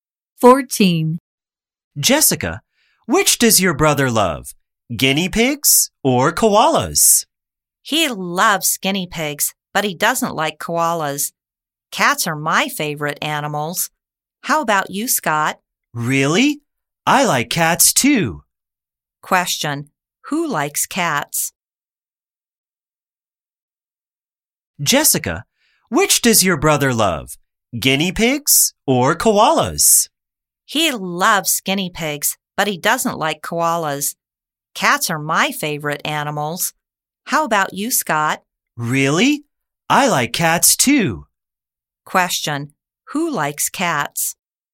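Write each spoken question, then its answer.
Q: Question, who likes cats?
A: Jessica and Scott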